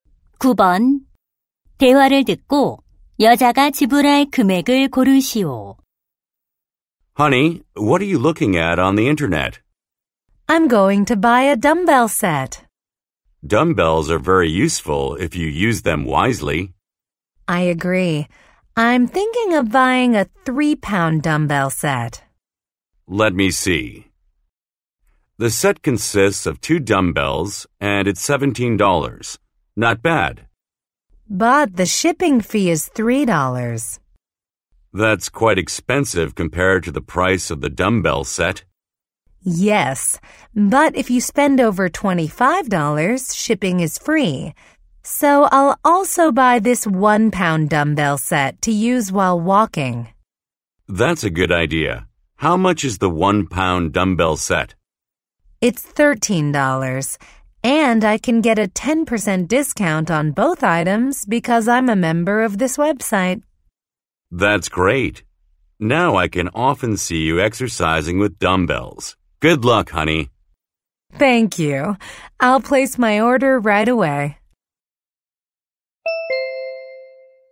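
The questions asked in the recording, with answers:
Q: 대화를 듣고 여자가 지불할 금액을 고르시오.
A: $27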